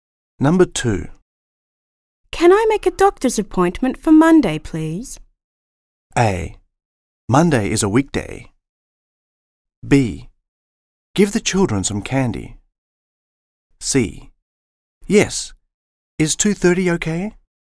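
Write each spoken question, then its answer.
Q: Can I make a doctor's appointment for Monday, please?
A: C: Yes. Is 2:30 okay?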